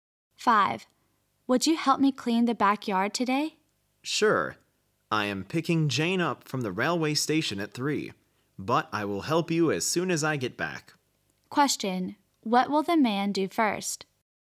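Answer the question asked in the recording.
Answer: Pick Jane up at the railway station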